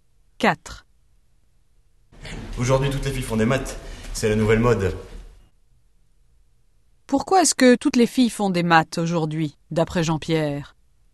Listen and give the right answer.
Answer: Parce que c'est la nouvelle mode.